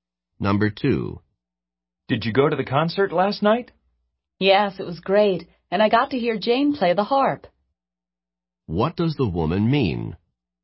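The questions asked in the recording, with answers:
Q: What does the woman mean?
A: Jane played the harp and the woman heard her.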